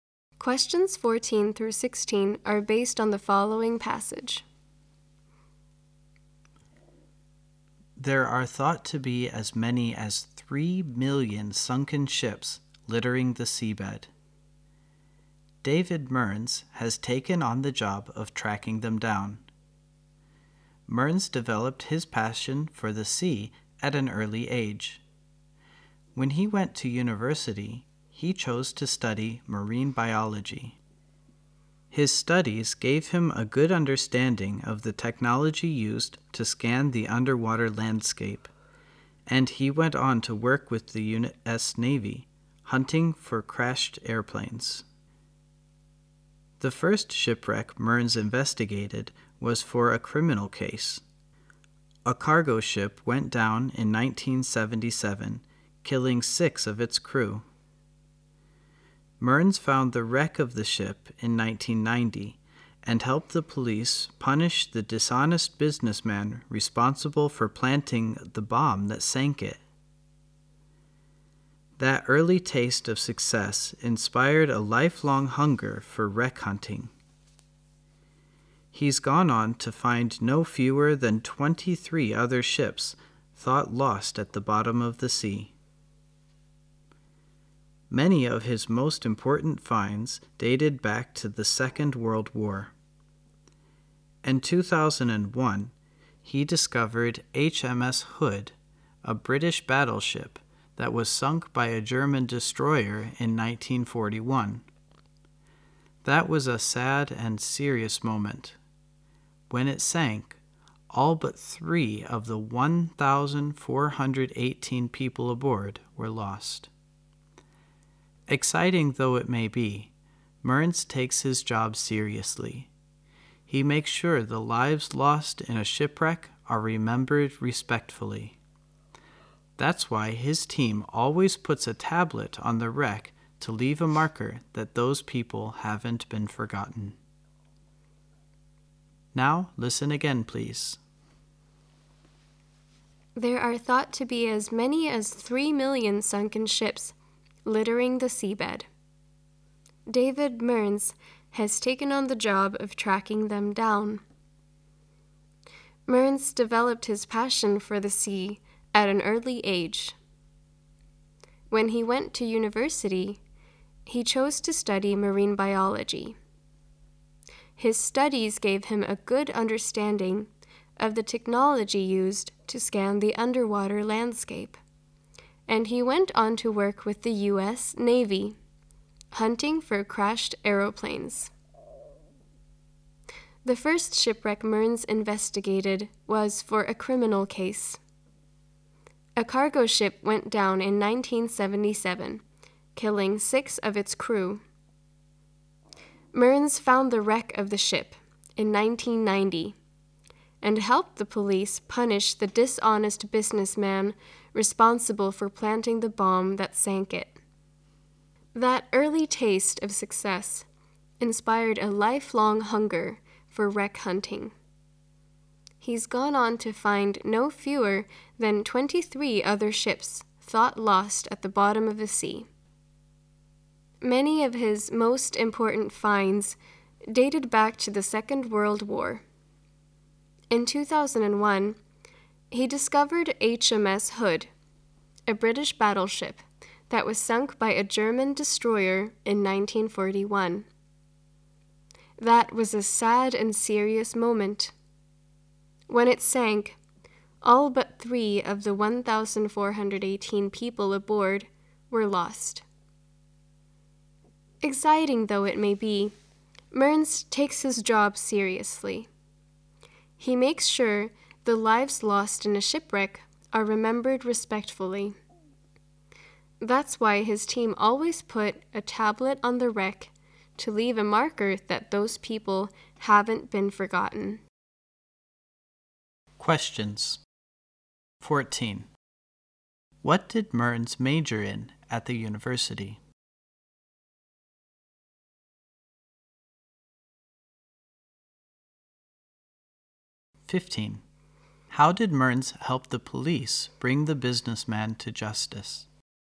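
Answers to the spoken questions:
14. Marine biology
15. By finding the wreck of the cargo ship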